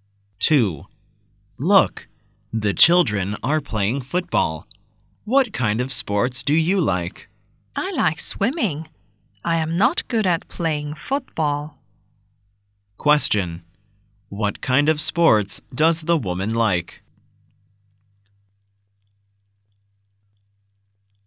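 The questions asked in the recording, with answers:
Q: What kind of sports does the woman like?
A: Swimming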